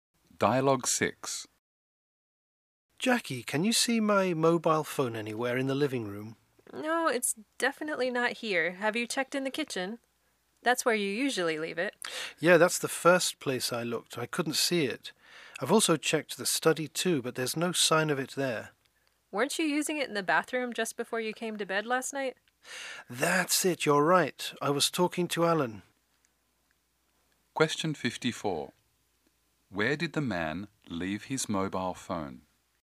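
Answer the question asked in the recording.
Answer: In the bathroom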